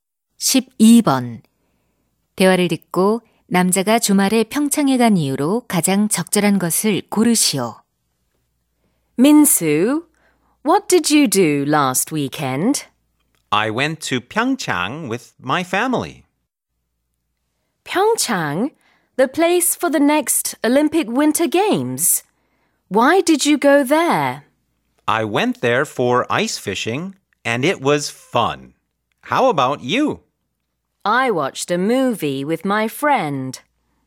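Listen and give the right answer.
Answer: 얼음 낚시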